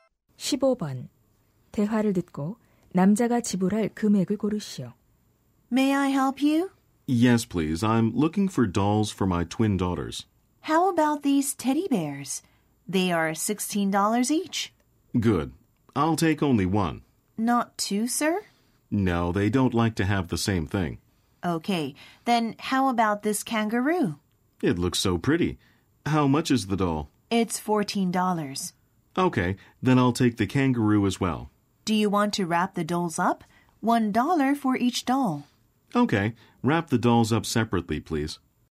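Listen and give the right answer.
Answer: 32달러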